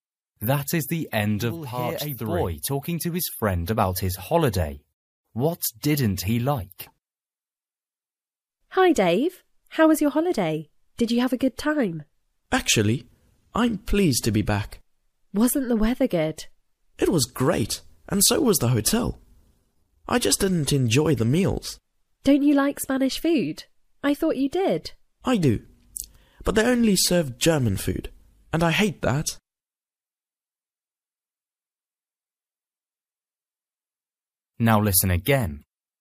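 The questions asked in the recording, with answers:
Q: What didn't he like?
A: The food (meals) at the hotel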